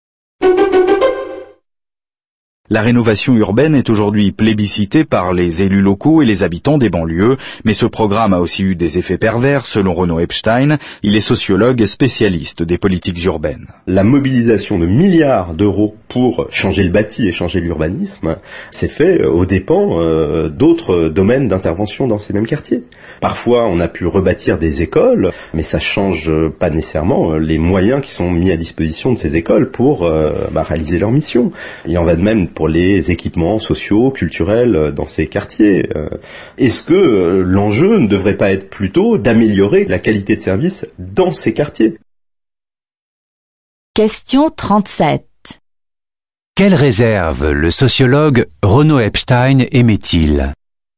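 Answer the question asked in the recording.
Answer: Les investissements dans le bâti se sont faits aux dépens de la qualité des services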